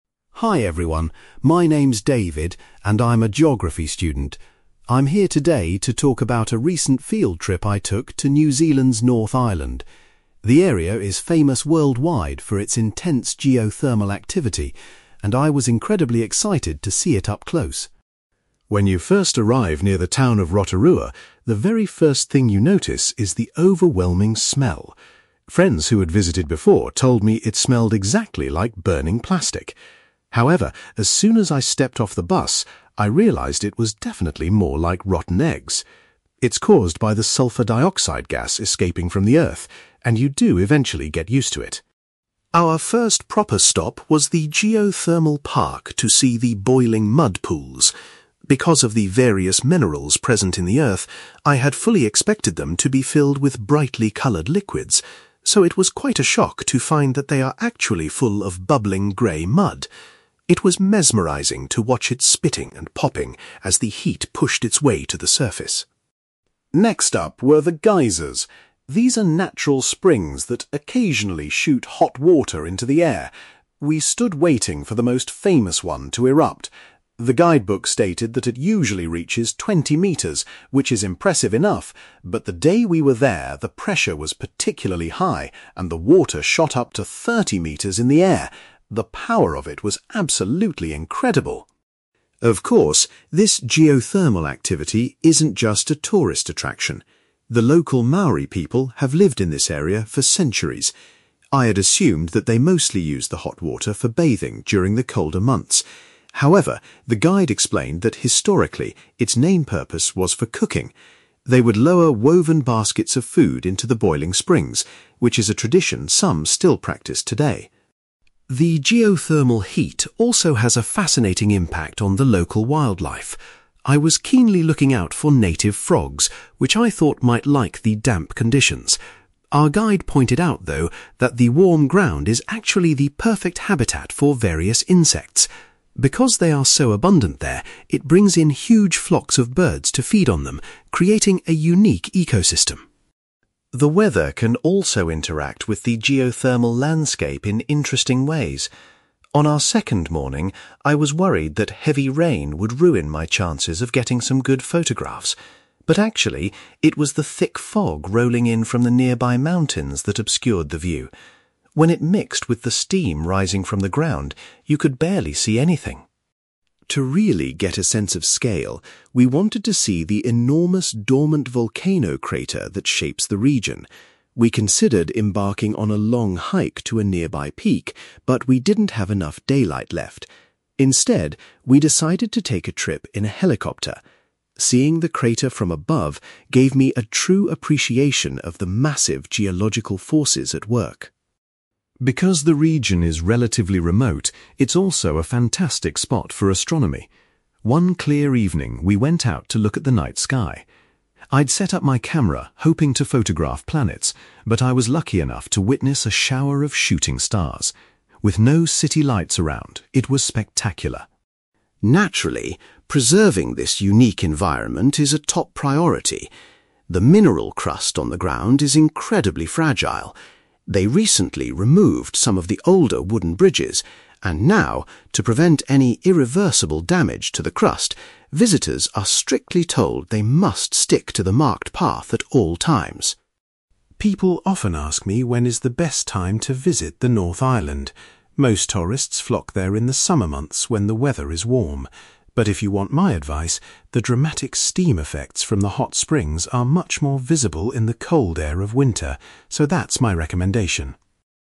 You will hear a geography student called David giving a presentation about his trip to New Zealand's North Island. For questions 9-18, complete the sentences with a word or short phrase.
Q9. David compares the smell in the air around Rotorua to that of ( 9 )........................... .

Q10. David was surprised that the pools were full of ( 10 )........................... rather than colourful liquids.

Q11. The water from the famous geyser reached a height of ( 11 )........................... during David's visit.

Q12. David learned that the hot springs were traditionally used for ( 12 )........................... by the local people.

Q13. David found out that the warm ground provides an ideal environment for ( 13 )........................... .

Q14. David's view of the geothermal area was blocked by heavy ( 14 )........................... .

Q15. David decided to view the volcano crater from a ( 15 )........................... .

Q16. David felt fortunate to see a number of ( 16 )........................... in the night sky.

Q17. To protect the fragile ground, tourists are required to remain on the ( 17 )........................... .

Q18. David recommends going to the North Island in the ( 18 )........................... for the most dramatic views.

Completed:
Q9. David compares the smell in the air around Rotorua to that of rotten eggs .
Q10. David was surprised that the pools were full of grey mud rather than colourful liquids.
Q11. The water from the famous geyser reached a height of 30 metres / thirty metres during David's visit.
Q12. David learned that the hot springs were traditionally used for cooking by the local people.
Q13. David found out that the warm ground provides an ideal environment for insects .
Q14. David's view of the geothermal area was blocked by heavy fog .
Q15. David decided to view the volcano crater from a helicopter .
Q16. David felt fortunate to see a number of shooting stars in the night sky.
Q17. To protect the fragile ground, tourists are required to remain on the path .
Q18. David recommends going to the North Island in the winter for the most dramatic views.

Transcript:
David: Hi everyone. My name's David, and I'm a geography student. I'm here today to talk about a recent field trip I took to New Zealand's North Island. The area is famous worldwide for its intense geothermal activity, and I was incredibly excited to see it up close.
When you first arrive near the town of Rotorua, the very first thing you notice is the overwhelming smell. Friends who had visited before told me it smelled exactly like burning plastic. However, as soon as I stepped off the bus, I realised it was definitely more like rotten eggs. It's caused by the sulfur dioxide gas escaping from the earth, and you do eventually get used to it!
Our first proper stop was the geothermal park to see the boiling mud pools. Because of the various minerals present in the earth, I had fully expected them to be filled with brightly coloured liquids. So, it was quite a shock to find that they are actually full of bubbling grey mud. It was mesmerizing to watch it spitting and popping as the heat pushed its way to the surface.
Next up were the geysers. These are natural springs that occasionally shoot hot water into the air. We stood waiting for the most famous one to erupt. The guidebook stated that it usually reaches 20 metres, which is impressive enough, but the day we were there, the pressure was particularly high and the water shot up to 30 metres in the air. The power of it was absolutely incredible.
Of course, this geothermal activity isn't just a tourist attraction. The local Maori people have lived in this area for centuries. I had assumed that they mostly used the hot water for bathing during the colder months. However, the guide explained that historically, its main purpose was for cooking. They would lower woven baskets of food into the boiling springs, which is a tradition some still practice today.
The geothermal heat also has a fascinating impact on the local wildlife. I was keenly looking out for native frogs, which I thought might like the damp conditions. Our guide pointed out, though, that the warm ground is actually the perfect habitat for various insects. Because they are so abundant there, it brings in huge flocks of birds to feed on them, creating a unique ecosystem.
The weather can also interact with the geothermal landscape in interesting ways. On our second morning, I was worried that heavy rain would ruin my chances of getting some good photographs. But actually, it was the thick fog rolling in from the nearby mountains that obscured the view. When it mixed with the steam rising from the ground, you could barely see anything.
To really get a sense of scale, we wanted to see the enormous dormant volcano crater that shapes the region. We considered embarking on a long hike to a nearby peak, but we didn't have enough daylight left. Instead, we decided to take a trip in a helicopter. Seeing the crater from above gave me a true appreciation of the massive geological forces at work.
Because the region is relatively remote, it's also a fantastic spot for astronomy. One clear evening, we went out to look at the night sky. I'd set up my camera hoping to photograph planets, but I was lucky enough to witness a shower of shooting stars. With no city lights around, it was spectacular.
Naturally, preserving this unique environment is a top priority. The mineral crust on the ground is incredibly fragile. They recently removed some of the older wooden bridges, and now, to prevent any irreversible damage to the crust, visitors are strictly told they must stick to the marked path at all times.
People often ask me when is the best time to visit the North Island. Most tourists flock there in the summer months when the weather is warm. But if you want my advice, the dramatic steam effects from the hot springs are much more visible in the cold air of winter, so that's my recommendation.

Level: B2